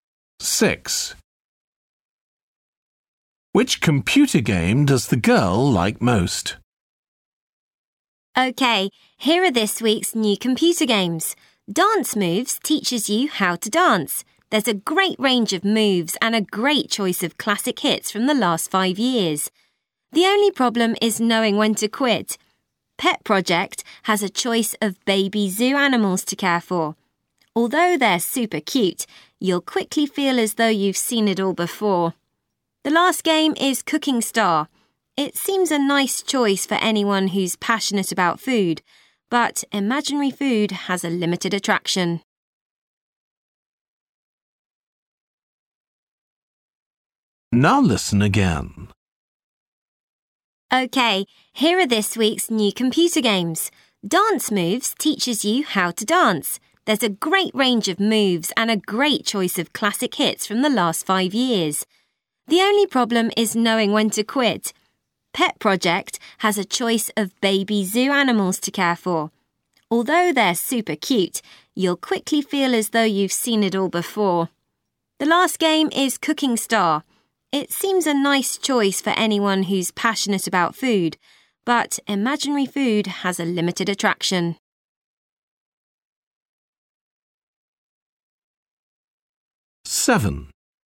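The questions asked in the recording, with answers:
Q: Which computer game does the girl like most?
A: Dance Moves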